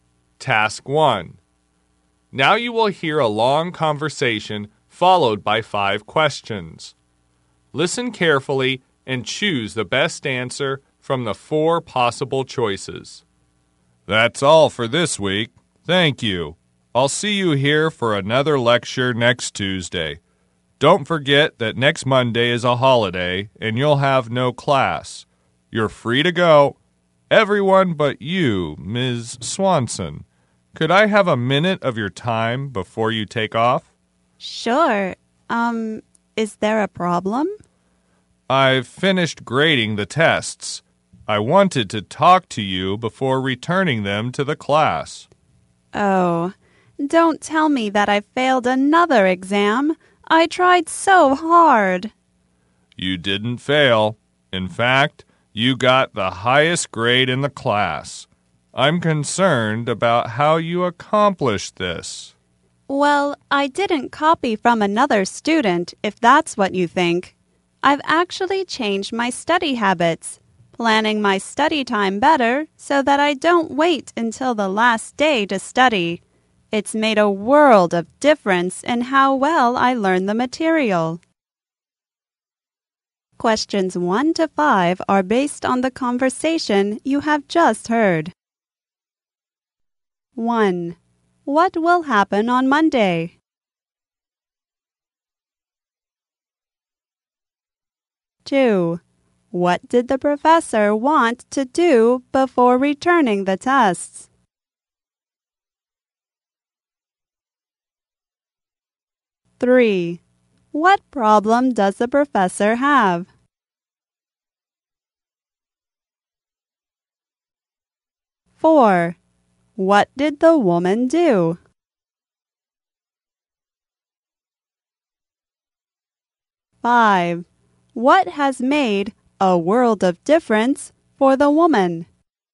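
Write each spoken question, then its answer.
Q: What will happen on Monday?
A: It's a holiday, so there will be no class.

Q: What did the professor want to do before returning the tests?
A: Talk to Ms. Swanson.

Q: What problem does the professor have?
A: He is concerned about how she got the highest grade.

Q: What did the woman do?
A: She changed her study habits and planned her study time better.

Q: What has made a world of difference for the woman?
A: Changing her study habits and planning her study time.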